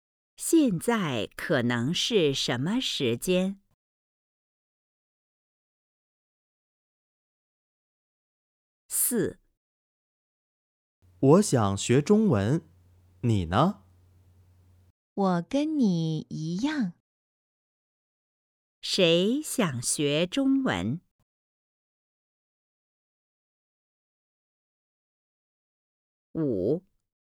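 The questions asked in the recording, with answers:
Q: 谁想学中文?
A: 两个人都想学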